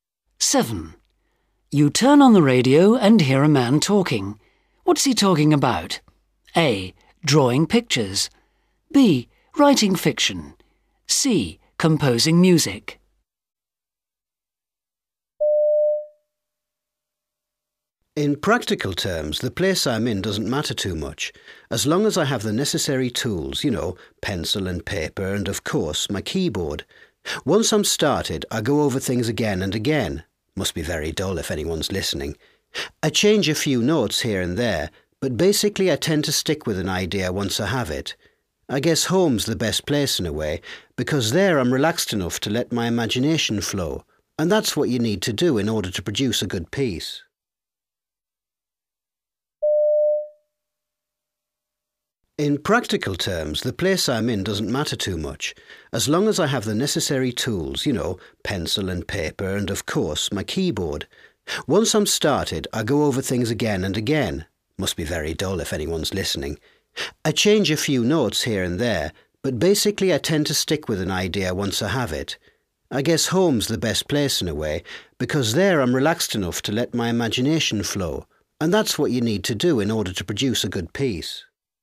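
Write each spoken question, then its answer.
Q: What's he talking about?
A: C: Composing music.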